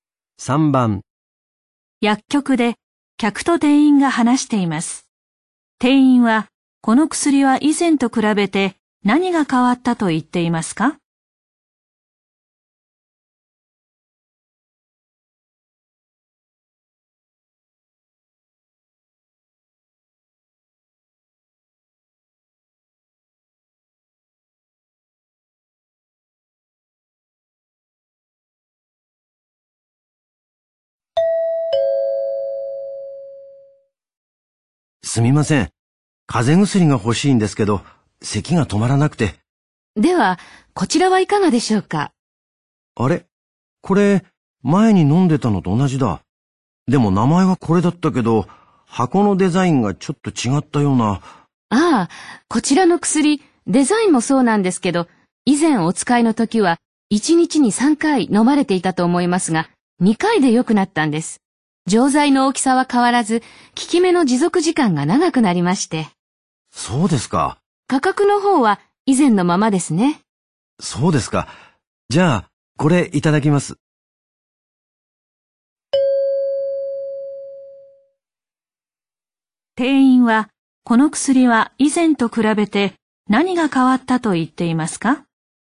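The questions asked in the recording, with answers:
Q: 店員は、この薬は以前と比べて何が変わったと言っていますか?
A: 1日に飲む回数が3回から2回になった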